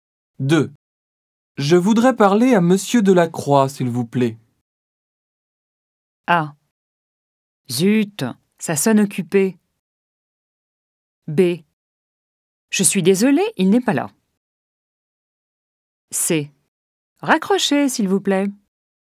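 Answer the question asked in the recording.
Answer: B: Je suis désolée, il n'est pas là.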